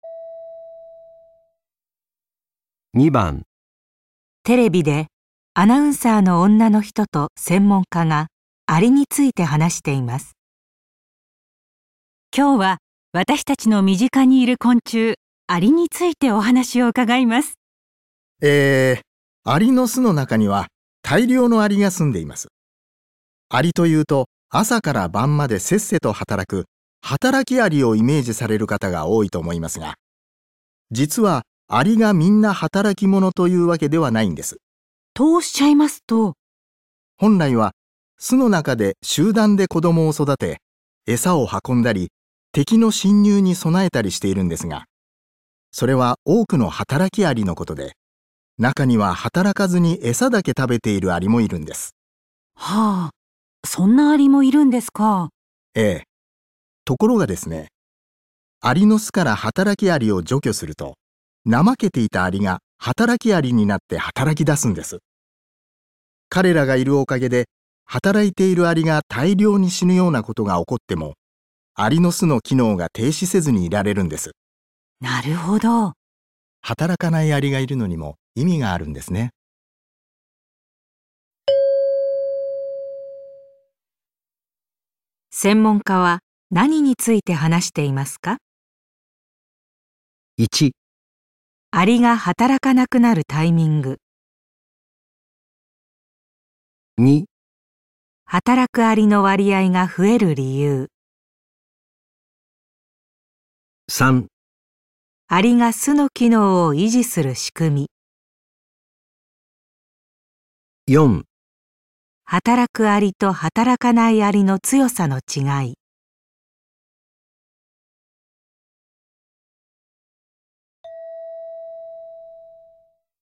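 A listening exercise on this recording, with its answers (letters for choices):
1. 専門家は何について話していますか。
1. アリが働かなくなるタイミング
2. 働くアリの割合が増える理由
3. アリが巣の機能を維持する仕組み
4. 働くアリと働かないアリの強さの違い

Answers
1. 3

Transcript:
男: えー、アリの巣の中には大量のアリが住んでいます。 アリというと朝から晩までせっせと働く、働きアリをイメ ージされる方が多いと思いますが、実はアリがみんな働き者というわけではないんです。
女:とおっしゃいますと?
男:本来は巣の中で集団で子供を育て、エサを運んだり、敵の侵入に備えたりしているんですが、それは多くの働きアリのことで、中には働かずにエサだけ食べているアリもいるんです。
女:はぁ、そんなアリもいるんですか。
男:ええ、ところがですね、 アリの巣から働きアリを除去すると、怠けていたアリが働きアリになって働き出すんです。彼らがいるおかげで働いているアリが大量に死ぬようなことが起こっても、アリの巣の機能が停止せずにいられるんです。
女:なるほど。
男 : 働かないアリがいるのにも意味があるんですね。

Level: N1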